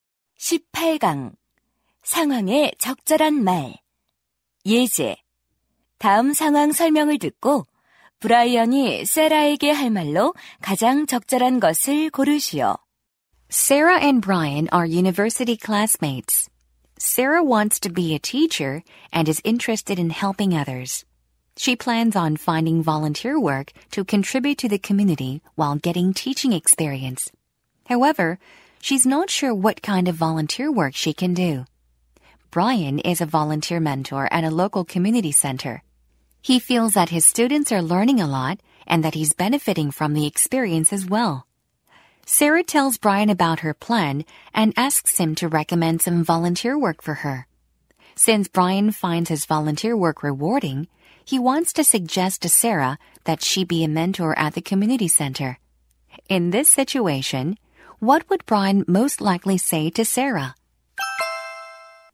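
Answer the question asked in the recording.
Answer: Why don't you become a mentor at the community center?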